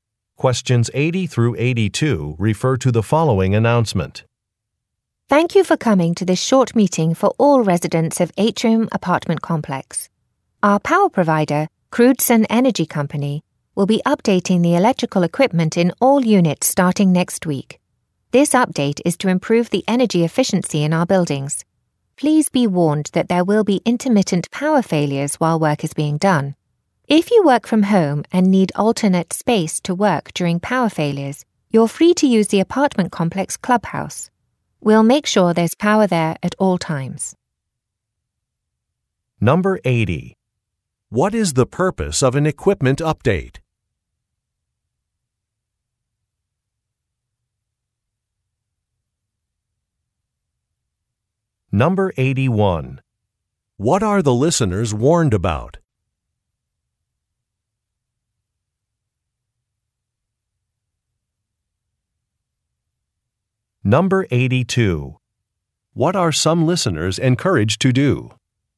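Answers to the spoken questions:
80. To improve energy efficiency
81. Intermittent power failures
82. Use the apartment complex clubhouse as a workspace during power failures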